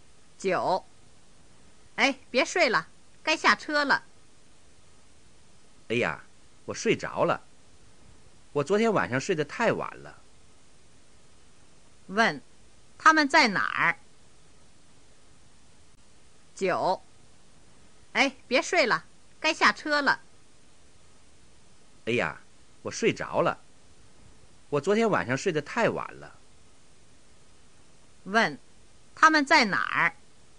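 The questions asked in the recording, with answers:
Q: 他们在哪儿?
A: 在车上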